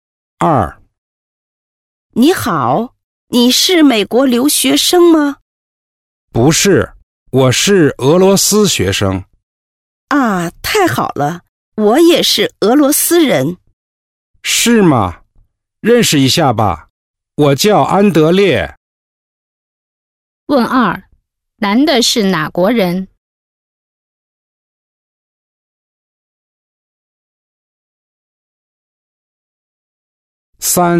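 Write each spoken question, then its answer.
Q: 男的是哪国人?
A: 俄罗斯人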